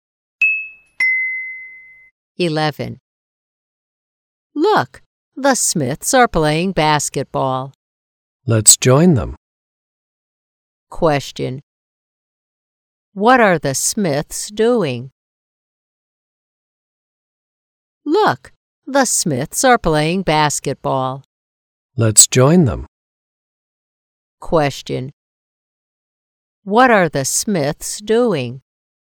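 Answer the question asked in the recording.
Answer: Playing basketball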